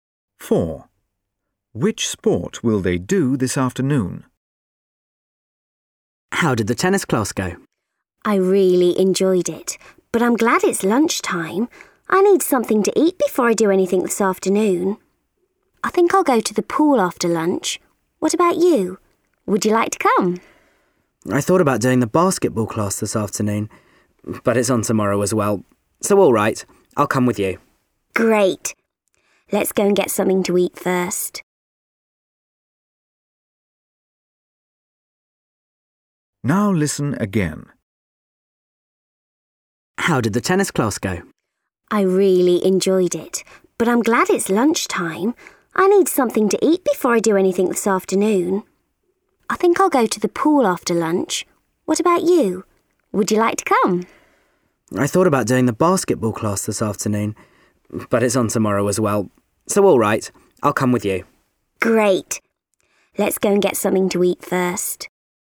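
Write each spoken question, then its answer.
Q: Which sport will they do this afternoon?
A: Swimming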